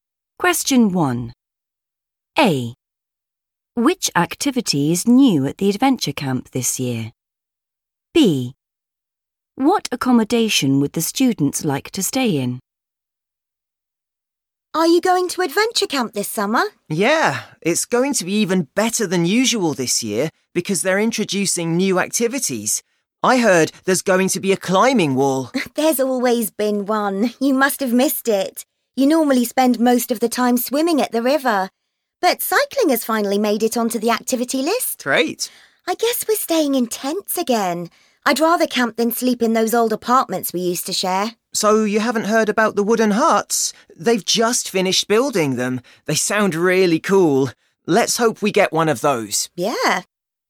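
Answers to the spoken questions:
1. cycling
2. wooden huts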